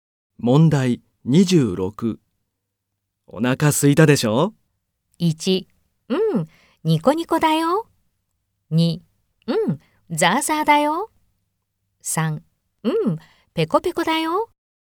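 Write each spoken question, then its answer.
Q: お腹空いたでしょ?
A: 3: うん、ペコペコだよ。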